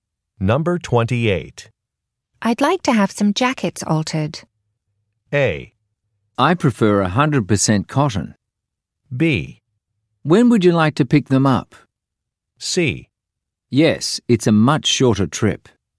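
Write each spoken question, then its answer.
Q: I'd like to have some jackets altered.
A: B: When would you like to pick them up?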